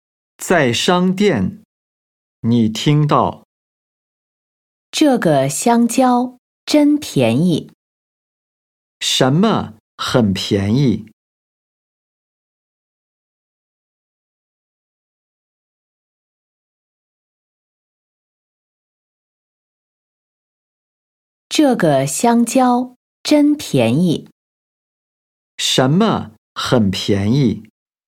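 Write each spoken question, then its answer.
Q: 什么很便宜?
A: 香蕉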